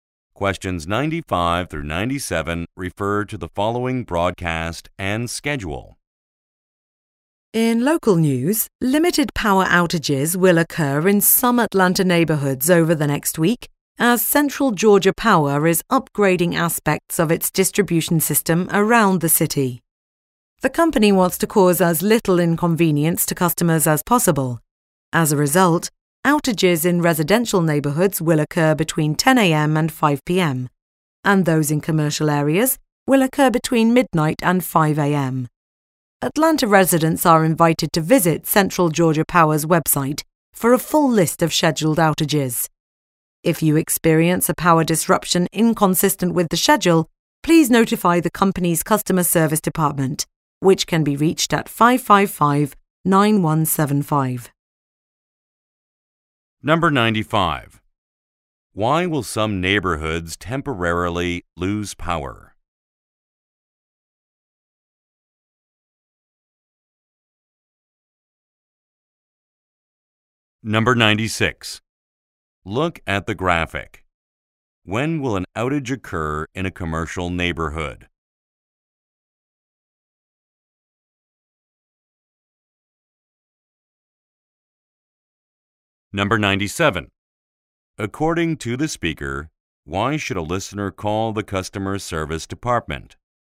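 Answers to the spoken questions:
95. The power company is upgrading its distribution system
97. To report a power disruption inconsistent with the schedule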